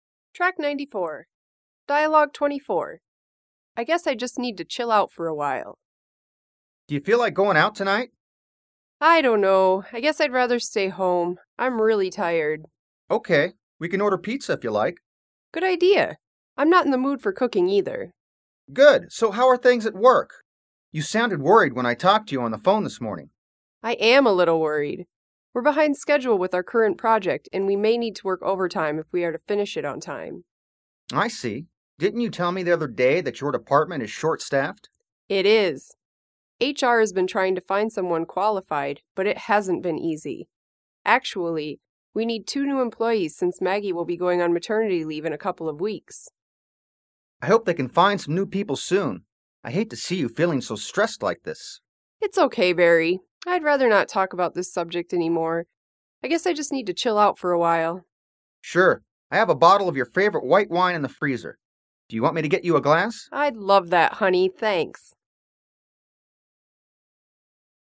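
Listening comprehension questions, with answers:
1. Why doesn't Tiffany feel like going out tonight?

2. Why is Tiffany a little worried?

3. What does Tiffany think she needs to do now?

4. What does Barry offer Tiffany?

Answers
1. Because she is really tired.
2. They are behind schedule with their project and may need to work overtime.
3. Chill out for a while.
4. A glass of her favorite white wine.

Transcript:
Dialogue Script – I guess I just need to chill out for a while
Barry: Do you feel like going out tonight?
Tiffany: I don't know, I guess I'd rather stay home. I'm really tired.
Barry: Ok, we can order pizza if you like.
Tiffany: Good idea, I'm not in the mood for cooking either.
Barry: Good! So, how are things at work? You sounded worried when I talked to you on the phone this morning.
Tiffany: I am a little worried! We're behind schedule with our current project and we may need to work overtime if we are to finish it on time.
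Barry: I see. Didn't you tell me the other day that your department is short-staffed?
Tiffany: It is. HR has been trying to find someone qualified but it hasn't been easy. Actually we need two new employees since Maggy will be going on maternity leave in a couple of weeks.
Barry: I hope they can find some new people soon. I hate to see you feeling stressed like this.
Tiffany: It's okay Barry, I'd rather not talk about this subject anymore.
Barry: Sure, I have a bottle of your favorite white wine in the freezer. Do you want me to get you a glass?
Tiffany: I'd love that honey. Thanks!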